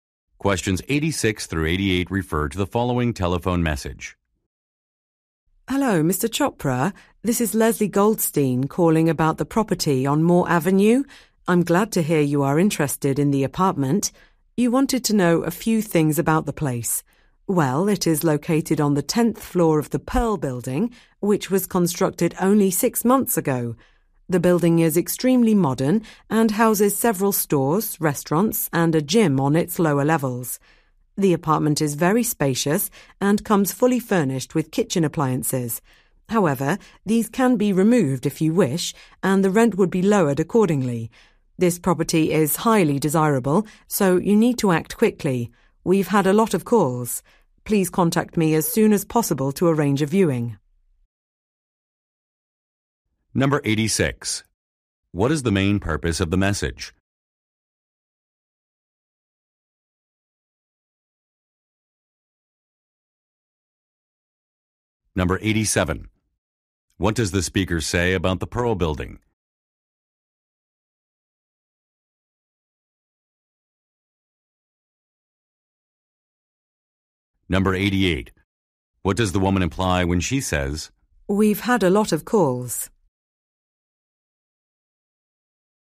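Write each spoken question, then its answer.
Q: What is the main purpose of the message?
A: To give information about an apartment

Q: What does the speaker say about the Pearl Building?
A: It was built only six months ago

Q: "We've had a lot of calls"?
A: The apartment may be rented soon, so he should act quickly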